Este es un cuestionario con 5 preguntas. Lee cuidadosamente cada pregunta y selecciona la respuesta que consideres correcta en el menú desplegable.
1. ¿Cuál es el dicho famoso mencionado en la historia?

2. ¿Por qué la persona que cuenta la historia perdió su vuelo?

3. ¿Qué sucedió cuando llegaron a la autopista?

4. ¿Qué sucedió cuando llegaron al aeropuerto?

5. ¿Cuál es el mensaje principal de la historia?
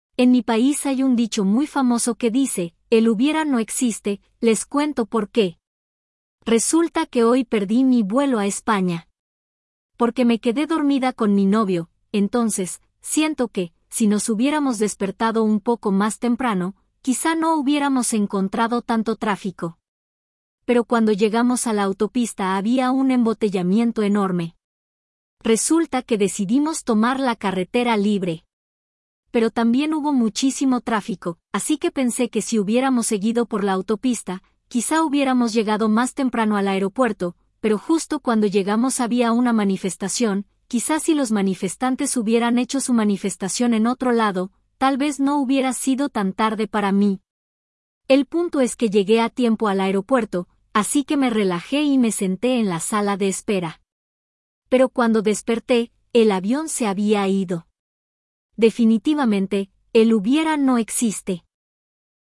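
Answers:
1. El hubiera no existe.
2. Porque se quedó dormida en la sala de espera y el avión se fue.
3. Había un embotellamiento enorme.
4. Había una manifestación.
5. El hubiera no existe: no sirve pensar en lo que pudo haber pasado.

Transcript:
En mi país hay un dicho muy famoso que dice "el hubiera no existe"; les cuento por qué.
Resulta que hoy perdí mi vuelo a España porque me quedé dormida con mi novio, entonces, siento que, si nos hubiéramos despertado un poco más temprano, quizá no hubiéramos encontrado tanto tráfico, pero cuando llegamos a la autopista había un embotellamiento enorme.
Resulta que decidimos tomar la carretera libre, pero también hubo muchísimo tráfico, así que pensé que si hubiéramos seguido por la autopista quizá hubiéramos llegado más temprano al aeropuerto, pero justo cuando llegamos había una manifestación; quizá si los manifestantes hubieran hecho su manifestación en otro lado tal vez no hubiera sido tan tarde para mí.
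El punto es que llegué a tiempo al aeropuerto, así que me relajé y me senté en la sala de espera, pero cuando desperté... el avión se había ido.

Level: intermediate (B2)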